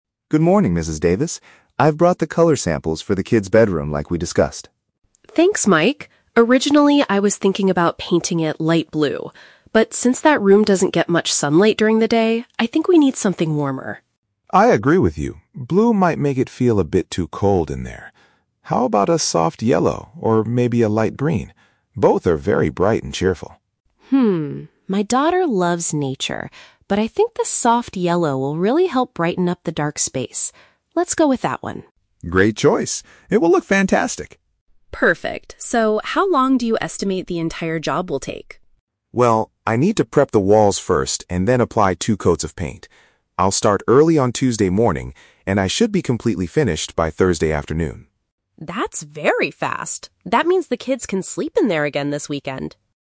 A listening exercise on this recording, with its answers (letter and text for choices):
Listen to a conversation between a homeowner and a painter. Choose the correct answer (A, B, or C) for each question.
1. Why does Sarah decide against her original color choice?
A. Because the painter forgot to bring that specific color sample.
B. Because the bedroom does not receive a lot of natural light.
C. Because her daughter prefers a color inspired by nature.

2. What color do they ultimately agree to paint the room?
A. Light blue.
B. Light green.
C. Soft yellow.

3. When will the painting project be completed?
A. On Tuesday morning.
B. By Thursday afternoon.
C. During the weekend.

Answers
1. B. Because the bedroom does not receive a lot of natural light.
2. C. Soft yellow.
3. B. By Thursday afternoon.

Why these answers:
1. Sarah says she originally wanted blue, but "since that room doesn't get much sunlight during the day, I think we need something warmer." Option B paraphrases this perfectly (does not receive a lot of natural light = doesn't get much sunlight). Option A is not mentioned. Option C is the Trap: Sarah mentions her daughter "loves nature" (which might relate to green), but her actual reason for changing from blue is the lack of light.
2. After discussing the options, Sarah says, "I think the soft yellow will really help brighten up the dark space. Let's go with that one." Option C is the final decision. Option A (Light blue) is the Trap: It was her original idea, which she rejected. Option B (Light green) is another Trap: It was one of Mike's suggestions, but Sarah didn't choose it.
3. Mike explicitly states, "I should be completely finished by Thursday afternoon." Option B matches this exactly. Option A is the Trap: "Tuesday morning" is when Mike will start the job, not finish it. Option C is also a Trap: The "weekend" is when the kids can sleep in the room again, which happens after the job is done.

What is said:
Mike: Good morning, Mrs. Davis. I've brought the color samples for the kids' bedroom like we discussed.
Sarah: Thanks, Mike. Originally, I was thinking about painting it light blue. But since that room doesn't get much sunlight during the day, I think we need something warmer.
Mike: I agree with you. Blue might make it feel a bit too cold in there. How about a soft yellow or maybe a light green? Both are very bright and cheerful.
Sarah: Hmm, my daughter loves nature, but I think the soft yellow will really help brighten up the dark space. Let's go with that one.
Mike: Great choice. It will look fantastic.
Sarah: Perfect. So, how long do you estimate the entire job will take?
Mike: Well, I need to prep the walls first and then apply two coats of paint. I'll start early on Tuesday morning, and I should be completely finished by Thursday afternoon.